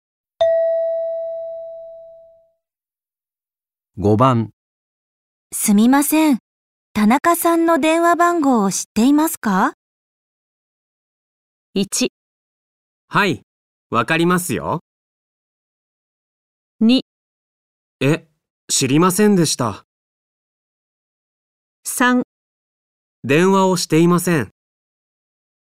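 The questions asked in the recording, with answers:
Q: すみません。田中さんの電話番号を知っていますか?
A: 1: はい、わかりますよ。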